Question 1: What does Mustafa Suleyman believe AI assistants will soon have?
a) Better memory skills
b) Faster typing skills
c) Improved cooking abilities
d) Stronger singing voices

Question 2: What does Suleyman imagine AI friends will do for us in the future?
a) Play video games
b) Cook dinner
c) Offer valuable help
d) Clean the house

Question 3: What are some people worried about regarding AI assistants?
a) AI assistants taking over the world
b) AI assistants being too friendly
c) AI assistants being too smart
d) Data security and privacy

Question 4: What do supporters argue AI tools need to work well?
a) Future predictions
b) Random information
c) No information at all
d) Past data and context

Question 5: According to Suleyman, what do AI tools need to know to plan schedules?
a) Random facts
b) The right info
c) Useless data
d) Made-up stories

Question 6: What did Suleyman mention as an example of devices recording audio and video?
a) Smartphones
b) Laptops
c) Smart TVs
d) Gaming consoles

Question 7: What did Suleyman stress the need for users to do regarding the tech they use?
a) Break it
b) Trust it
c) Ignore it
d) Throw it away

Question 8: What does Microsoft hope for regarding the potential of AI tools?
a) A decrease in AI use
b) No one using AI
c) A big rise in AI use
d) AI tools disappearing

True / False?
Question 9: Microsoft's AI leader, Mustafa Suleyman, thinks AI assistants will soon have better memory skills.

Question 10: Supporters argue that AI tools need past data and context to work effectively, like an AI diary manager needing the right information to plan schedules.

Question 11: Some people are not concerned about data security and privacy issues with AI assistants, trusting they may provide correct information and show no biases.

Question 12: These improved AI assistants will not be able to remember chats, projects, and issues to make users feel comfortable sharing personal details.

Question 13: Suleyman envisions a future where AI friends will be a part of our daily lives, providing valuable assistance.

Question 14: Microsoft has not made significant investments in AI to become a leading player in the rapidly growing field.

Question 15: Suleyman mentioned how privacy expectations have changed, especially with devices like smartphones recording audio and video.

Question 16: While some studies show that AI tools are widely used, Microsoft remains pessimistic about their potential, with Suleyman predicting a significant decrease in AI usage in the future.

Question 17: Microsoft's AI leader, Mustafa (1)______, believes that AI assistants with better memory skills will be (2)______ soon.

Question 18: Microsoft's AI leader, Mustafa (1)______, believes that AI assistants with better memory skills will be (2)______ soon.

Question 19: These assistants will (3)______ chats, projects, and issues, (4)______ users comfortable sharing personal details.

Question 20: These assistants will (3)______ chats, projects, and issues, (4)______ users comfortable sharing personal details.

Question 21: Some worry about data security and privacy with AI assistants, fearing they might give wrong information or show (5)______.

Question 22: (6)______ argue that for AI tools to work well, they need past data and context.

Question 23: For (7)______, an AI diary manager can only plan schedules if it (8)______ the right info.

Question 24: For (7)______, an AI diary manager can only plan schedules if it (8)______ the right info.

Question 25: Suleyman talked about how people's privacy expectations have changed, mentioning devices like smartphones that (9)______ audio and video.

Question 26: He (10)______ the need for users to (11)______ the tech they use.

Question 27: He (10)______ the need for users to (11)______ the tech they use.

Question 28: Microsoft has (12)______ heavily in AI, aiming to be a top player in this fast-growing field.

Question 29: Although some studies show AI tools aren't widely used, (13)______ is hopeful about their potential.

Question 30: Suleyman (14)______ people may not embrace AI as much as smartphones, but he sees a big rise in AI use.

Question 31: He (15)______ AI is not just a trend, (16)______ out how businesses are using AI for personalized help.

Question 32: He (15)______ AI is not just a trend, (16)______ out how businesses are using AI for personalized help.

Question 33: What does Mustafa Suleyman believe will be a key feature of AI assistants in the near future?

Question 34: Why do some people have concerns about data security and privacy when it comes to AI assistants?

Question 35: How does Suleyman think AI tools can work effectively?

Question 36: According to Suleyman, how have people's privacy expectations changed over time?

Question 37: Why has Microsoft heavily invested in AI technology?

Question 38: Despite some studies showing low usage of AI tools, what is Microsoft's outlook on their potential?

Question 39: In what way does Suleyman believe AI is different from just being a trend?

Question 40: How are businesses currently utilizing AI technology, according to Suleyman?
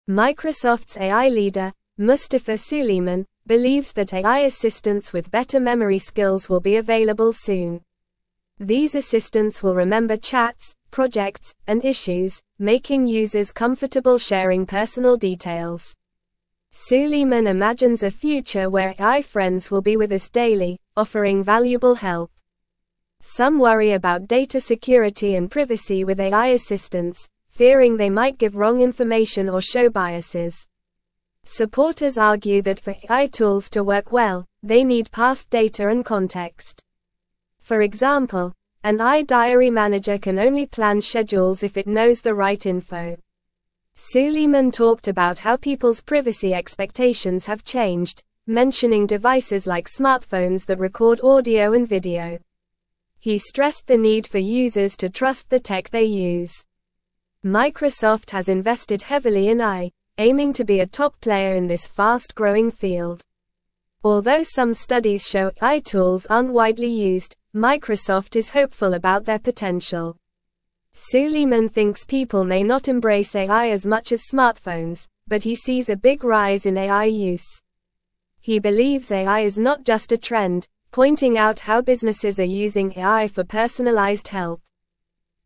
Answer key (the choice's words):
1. Better memory skills
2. Offer valuable help
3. Data security and privacy
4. Past data and context
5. The right info
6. Smartphones
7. Trust it
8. A big rise in AI use
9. True
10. True
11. False
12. False
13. True
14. False
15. True
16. False
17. Suleyman
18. available
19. remember
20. making
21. biases
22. Supporters
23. example
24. knows
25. record
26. stressed
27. trust
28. invested
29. Microsoft
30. thinks
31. believes
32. pointing
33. Mustafa Suleyman believes that AI assistants will have better memory skills, allowing them to remember chats, projects, and issues.
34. Some people worry that AI assistants might give wrong information, show biases, or misuse personal data, leading to concerns about data security and privacy.
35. Suleyman thinks AI tools can work effectively by having access to past data and context, which helps them provide accurate and personalized assistance.
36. Suleyman mentioned that people's privacy expectations have changed over time, with devices like smartphones recording audio and video, emphasizing the importance of users trusting the technology they use.
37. Microsoft has heavily invested in AI technology to become a leading player in the fast-growing field of artificial intelligence.
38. Microsoft is hopeful about the potential of AI tools, even though some studies show low usage.
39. Suleyman believes that AI is not just a trend but a technology that businesses are using for personalized assistance, indicating its long-term importance and impact.
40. Businesses are currently using AI technology for personalized help, as Suleyman mentioned how businesses are leveraging AI for various purposes.

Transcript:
Microsoft's AI leader, Mustafa Suleyman, believes that AI assistants with better memory skills will be available soon. These assistants will remember chats, projects, and issues, making users comfortable sharing personal details. Suleyman imagines a future where AI friends will be with us daily, offering valuable help.
Some worry about data security and privacy with AI assistants, fearing they might give wrong information or show biases. Supporters argue that for AI tools to work well, they need past data and context. For example, an AI diary manager can only plan schedules if it knows the right info.
Suleyman talked about how people's privacy expectations have changed, mentioning devices like smartphones that record audio and video. He stressed the need for users to trust the tech they use. Microsoft has invested heavily in AI, aiming to be a top player in this fast-growing field.
Although some studies show AI tools aren't widely used, Microsoft is hopeful about their potential. Suleyman thinks people may not embrace AI as much as smartphones, but he sees a big rise in AI use. He believes AI is not just a trend, pointing out how businesses are using AI for personalized help.

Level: Level 3